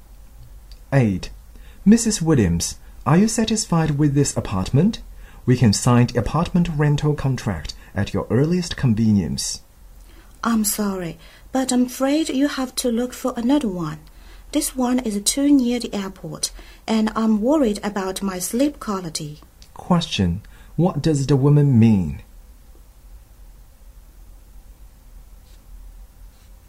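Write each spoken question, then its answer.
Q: What does the woman mean?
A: She won't rent the apartment because it's too noisy near the airport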